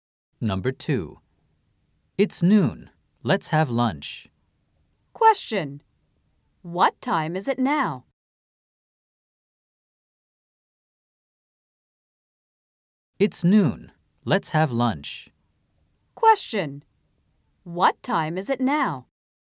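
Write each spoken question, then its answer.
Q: What time is it now?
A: It's noon.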